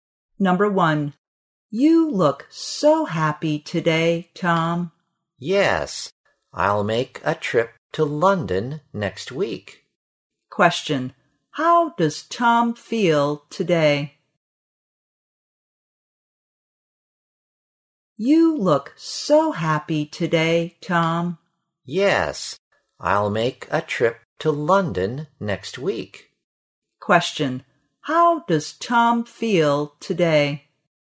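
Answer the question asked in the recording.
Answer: Happy.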